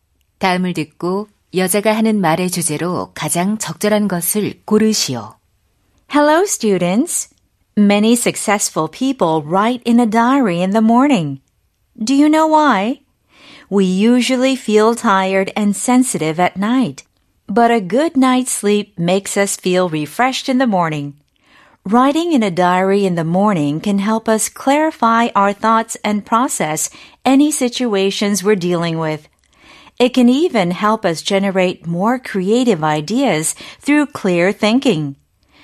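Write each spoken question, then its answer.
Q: 다음을 듣고 여자가 하는 말의 주제로 가장 적절한 것을 고르시오.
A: 아침에 일기를 쓰는 것의 이점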